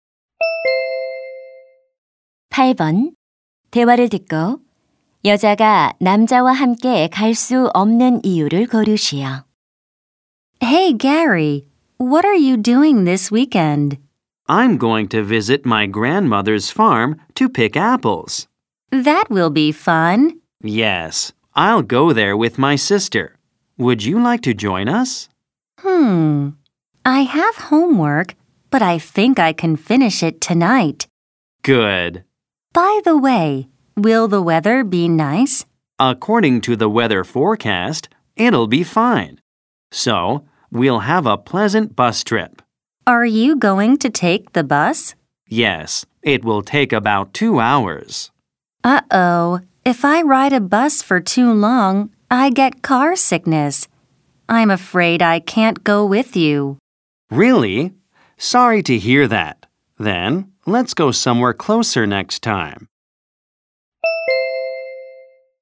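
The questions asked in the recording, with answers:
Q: 대화를 듣고 여자가 남자와 함께 갈 수 없는 이유를 고르시오.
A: 오래 버스를 타면 멀미를 해서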